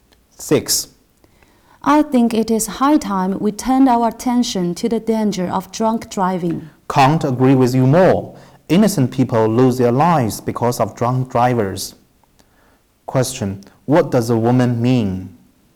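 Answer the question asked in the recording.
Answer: She fully agrees that drunk driving is a danger that needs attention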